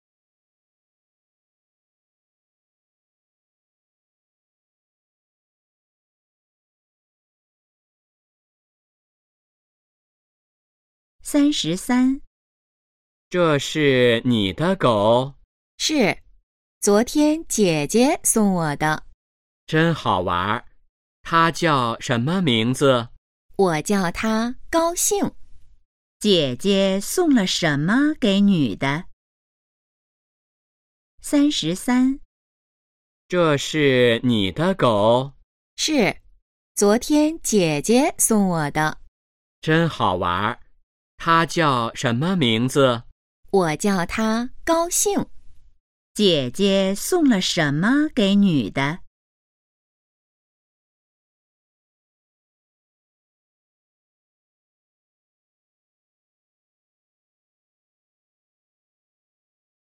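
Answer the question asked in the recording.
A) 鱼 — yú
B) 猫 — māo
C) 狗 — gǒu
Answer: C) 狗 — gǒu

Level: HSK2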